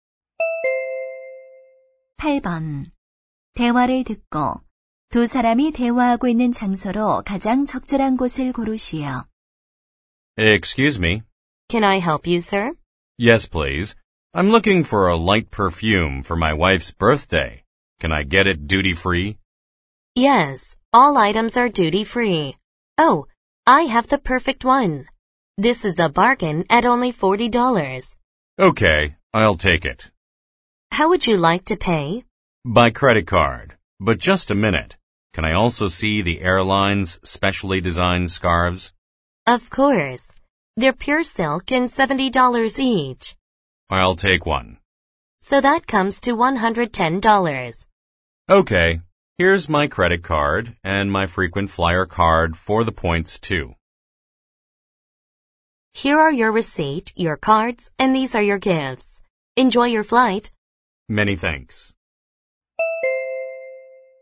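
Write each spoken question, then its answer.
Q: 대화를 듣고 두 사람이 대화하고 있는 장소로 가장 적절한 곳을 고르시오.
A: 비행기 안 (기내 면세점)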